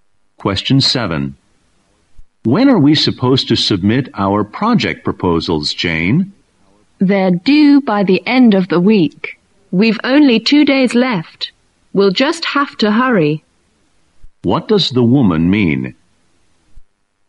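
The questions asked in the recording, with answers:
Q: What does the woman mean?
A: They must hurry; proposals are due by the end of the week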